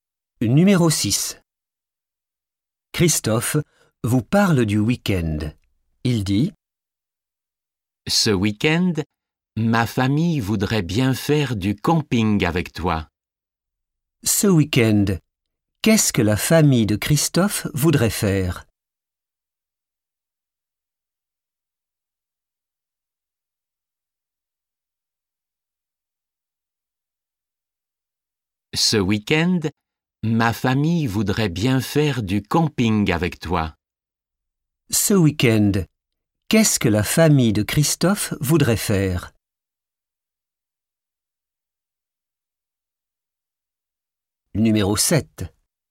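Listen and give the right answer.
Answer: du camping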